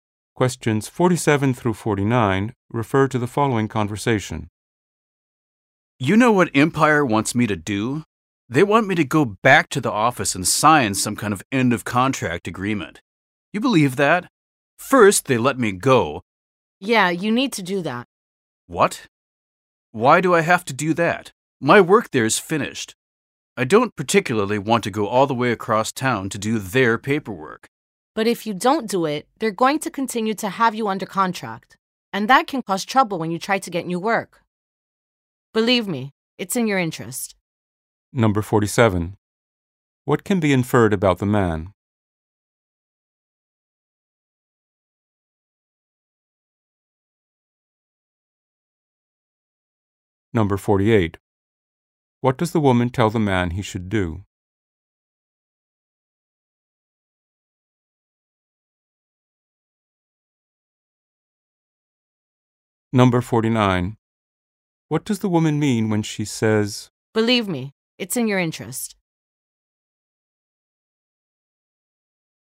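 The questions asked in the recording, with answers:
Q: What can be inferred about the man?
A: His job with Empire has ended

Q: What does the woman tell the man he should do?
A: Go to the office and sign the end of contract agreement

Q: What does the woman mean when she says,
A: Signing will help him avoid trouble getting new work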